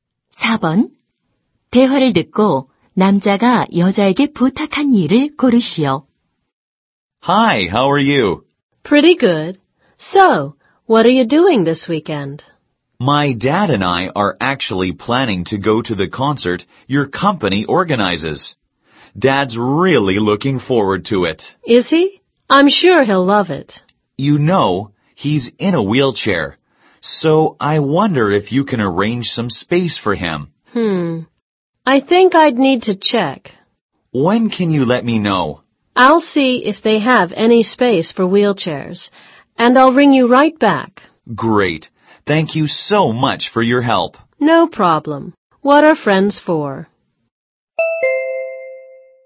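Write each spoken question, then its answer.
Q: 대화를 듣고 남자가 여자에게 부탁한 일을 고르시오.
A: 휠체어 공간 마련해 주기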